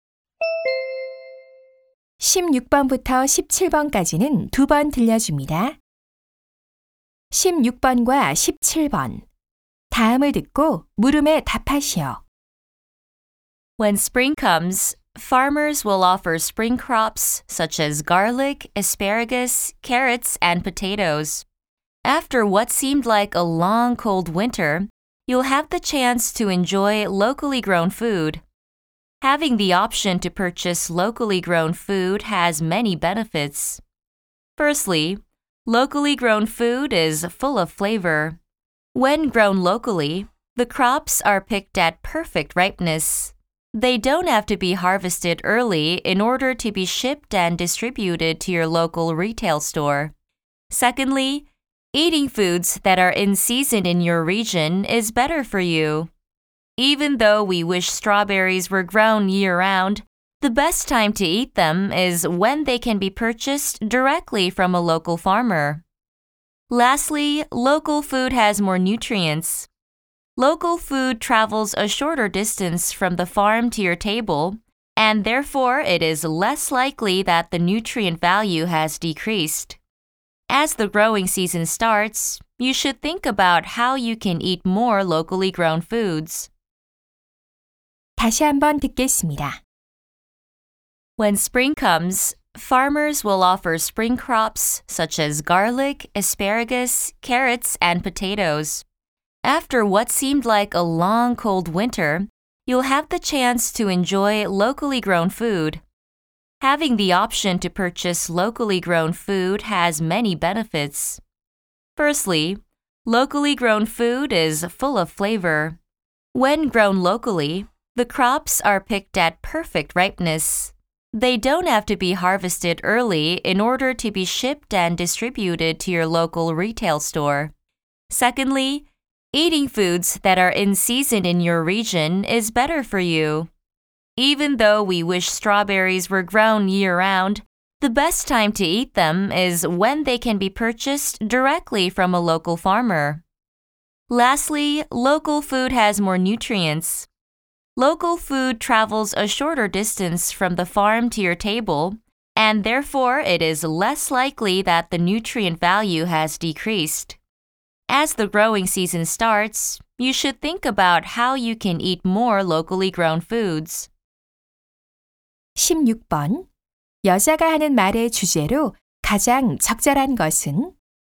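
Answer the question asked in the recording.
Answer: 지역에서 재배된 음식의 이점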